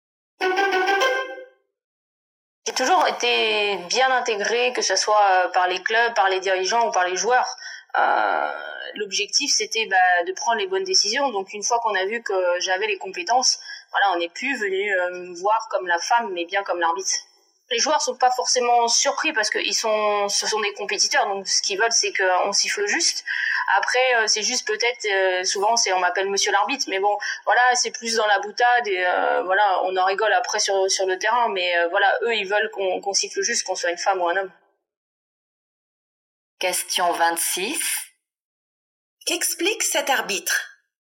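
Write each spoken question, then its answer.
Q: Qu'explique cet arbitre ?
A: Elle est jugée sur ses compétences et non comme une femme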